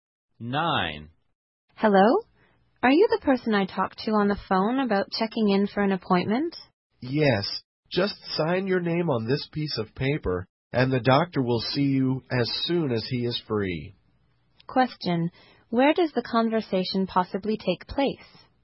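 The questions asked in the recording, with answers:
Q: Where does the conversation possibly take place?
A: At a doctor's office.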